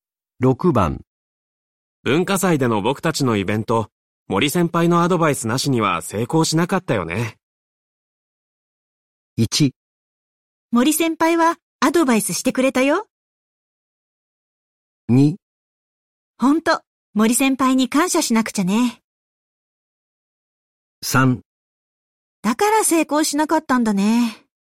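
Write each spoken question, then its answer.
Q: 文化祭での僕たちのイベント、森先輩のアドバイスなしには成功しなかったよね。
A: 2: ほんと、森先輩に感謝しなくちゃね。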